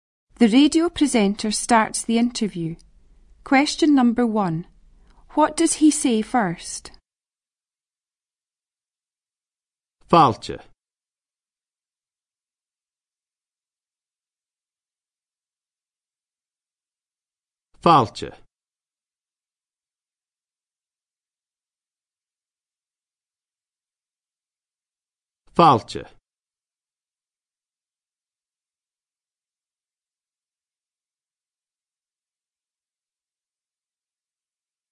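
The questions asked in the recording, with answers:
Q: What does he say first?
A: Welcome (Fàilte)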